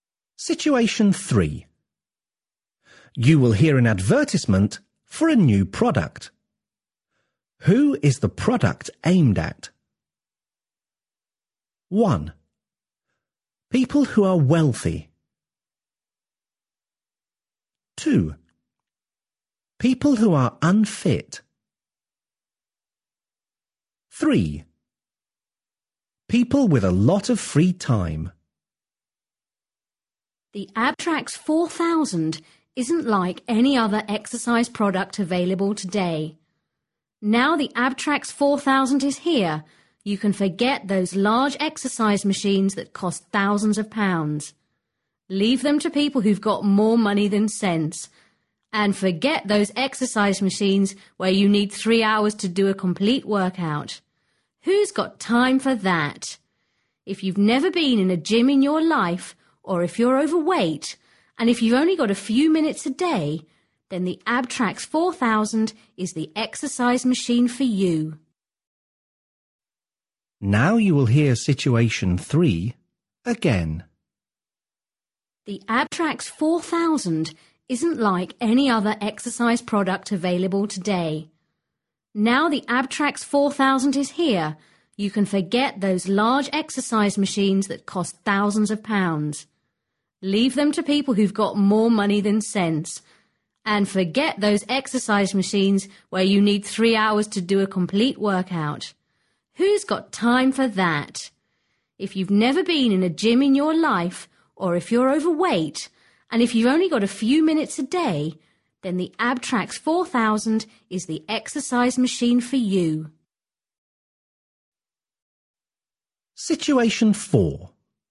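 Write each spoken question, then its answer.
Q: Who is the product aimed at?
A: 2: People who are unfit.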